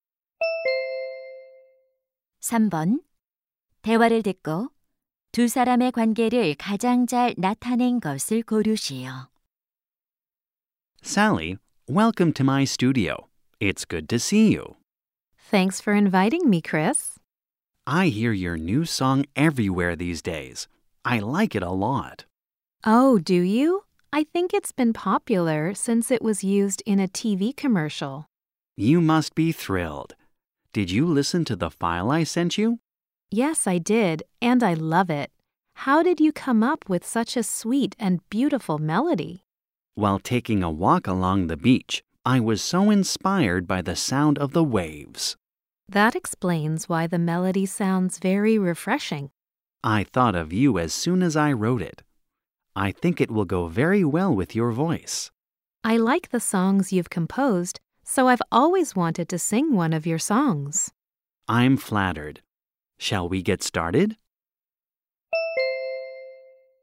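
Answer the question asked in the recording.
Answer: 작곡가 - 가수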